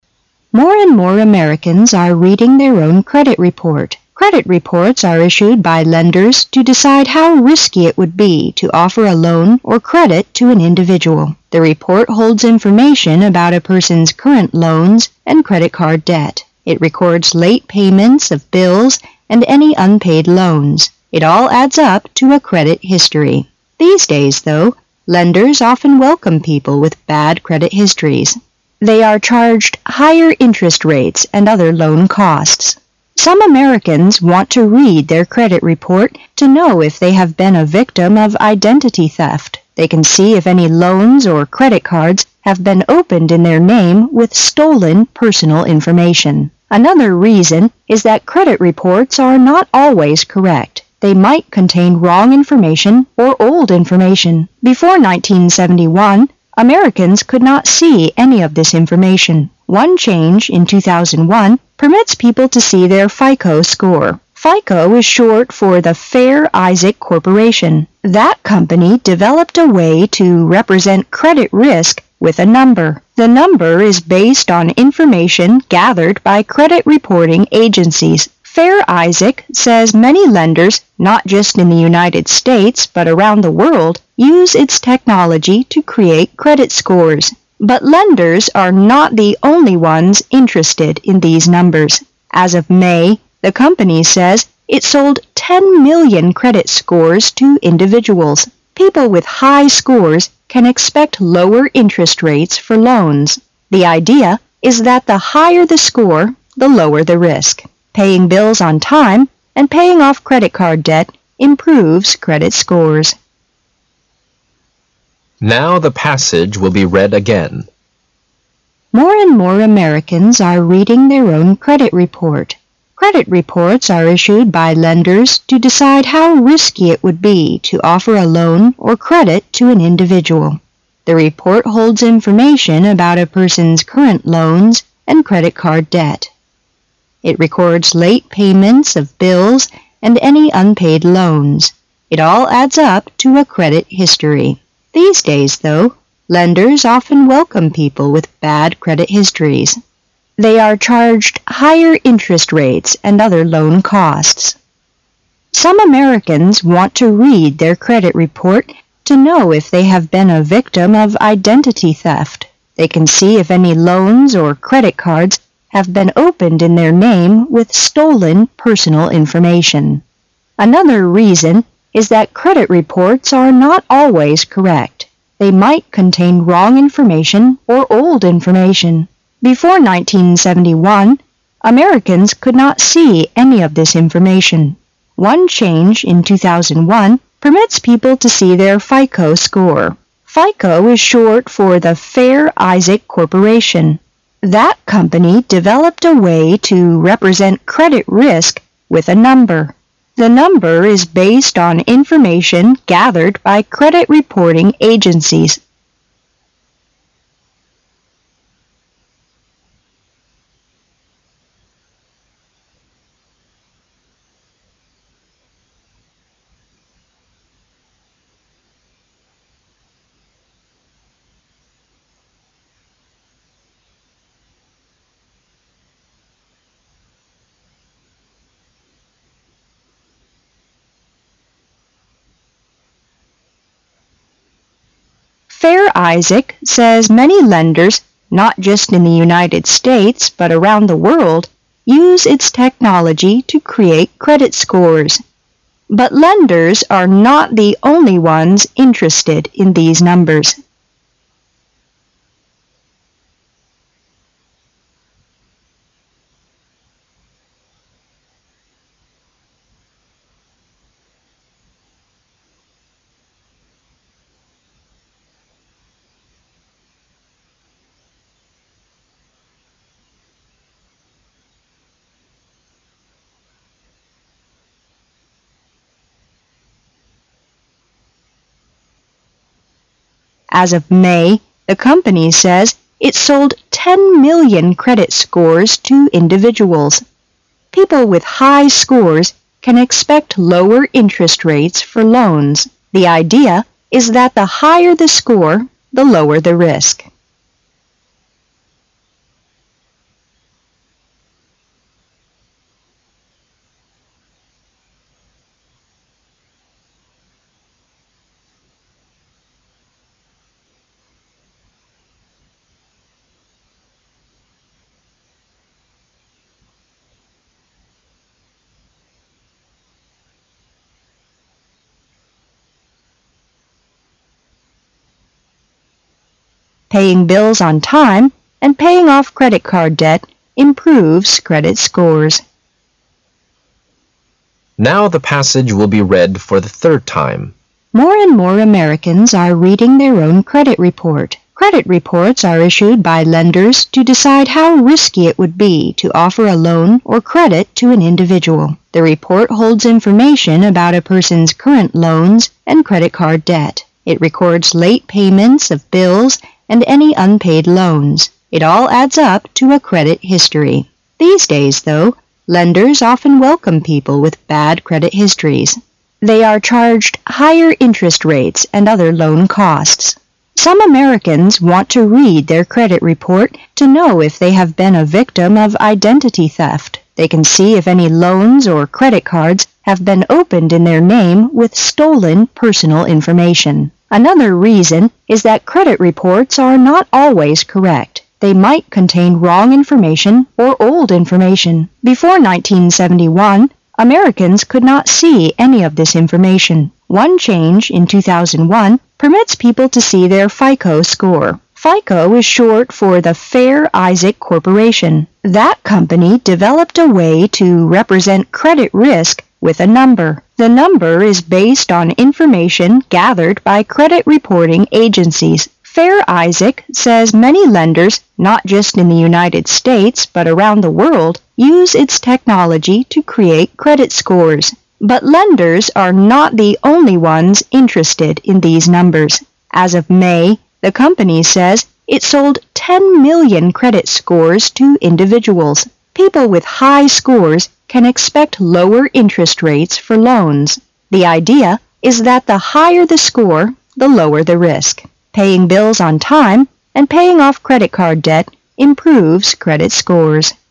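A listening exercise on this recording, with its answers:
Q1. Credit reports are 1 by lenders to decide how rrisky it would be to offer a loan or credit to an individual.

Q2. The report holds information about a person's 2 loans and credit-card debt.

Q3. It records late 3 of bills and any unpaid loans.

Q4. They are 4 higher interest rates and other loan costs.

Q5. Some Americans want to read their credit report to know if they have been a 5 of identity theft.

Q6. They can see if any loans or credit cards have been 6 in their name with stolen personal information.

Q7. They might 7 wrong information or old information.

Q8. FICO is short far the Fair Isaac 8 .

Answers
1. issued
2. current
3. payments
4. charged
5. victim
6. opened
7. contain
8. Corporation

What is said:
[解析] 36-46 More and more Americans are reading their own credit report. Credit reports are (36)issued by lenders to decide how risky it would be to offer a loan or credit to an individual. 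The report holds information about a person's (37)current loans and credit-card debt. It records late (38)payments of bills and any unpaid loans. It all adds up to a credit history. These days, though, lenders often welcome people with bad credit histories. They are (39)charged higher interest rates and other loan costs. Some Americans want to read their credit report to know if they have been a (40)victim of identity theft. They can see if any loans or credit cards have been (41)opened in their name with stolen personal information. Another reason is that credit reports are not always correct. They might (42)contain wrong information or old information. Before 1971, Americans could not see any of this information. One change, in 2001, permits people to see their FICO score. FICO is short for the Fair Isaac (43)Corporation. (44)That company developed a way to represent credit risk with a number. 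The number is based on information gathered by credit reporting agencies. Fair Isaac says many lenders not just in the United States but around the world use its technology to create credit scores. (45)But lenders are not the only ones interested in these numbers. As of May, the company says it sold ten million credit scores to individuals. (46)People with high scores can expect lower interest rates for loans. The idea is that the higher the score, the lower the risk. Paying bills on time and paying off credit-card debt improves credit scores.
current
payments
charged
victim
opened
contain
Corporation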